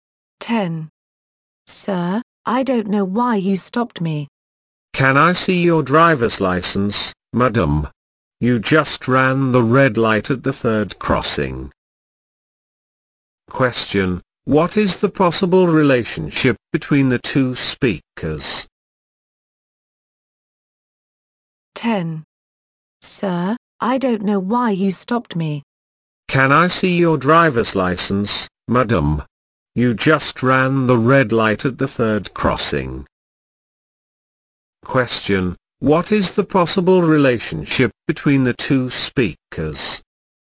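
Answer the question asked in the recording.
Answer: Policeman and driver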